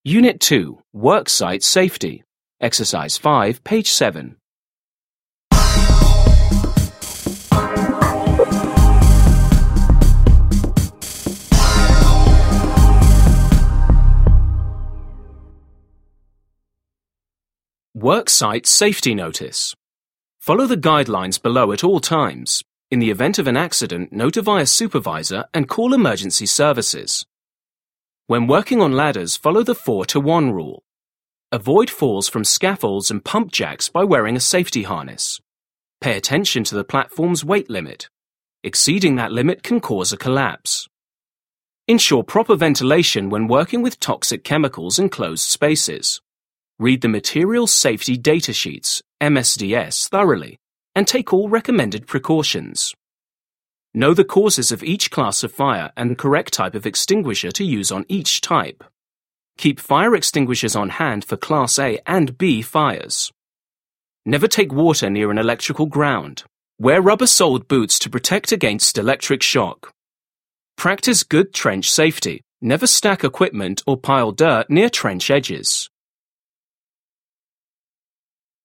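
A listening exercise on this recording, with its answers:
5. Listen and read the poster on worksite safety again. Where is proper ventilation very important?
Where is proper ventilation very important?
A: In closed spaces when working with toxic chemicals

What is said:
Unit 2. Worksite safety.
Worksite safety.
NOTICE (worksite safety poster)
Follow the guidelines below at all times. In the event of an accident, notify a supervisor and call emergency services.
· When working on ladders, follow the 4:1 rule. Avoid falls from scaffolds and pump jacks by wearing a safety harness. Pay attention to the platform's weight limit. Exceeding that limit can cause a collapse.
· Ensure proper ventilation when working with toxic chemicals in closed spaces. Read the Material Safety Data Sheets (MSDS) thoroughly and take all recommended precautions.
· Know the causes of each class of fire and the correct type of extinguisher to use on each type. 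Keep fire extinguishers on hand for Class A and B fires.
· Never take water near an electrical ground. Wear rubber-soled boots to protect against electric shock.
· Practice good trench safety. Never stack equipment or pile dirt near trench edges.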